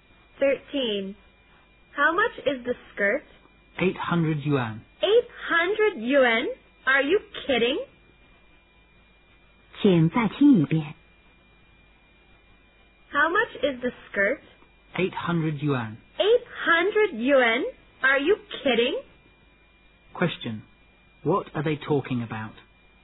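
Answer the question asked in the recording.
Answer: The price of a skirt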